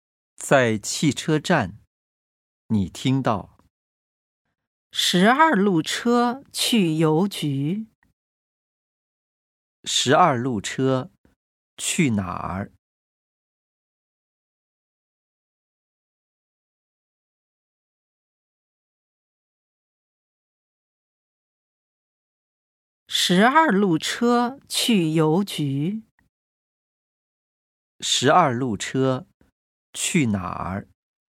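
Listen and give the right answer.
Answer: 邮局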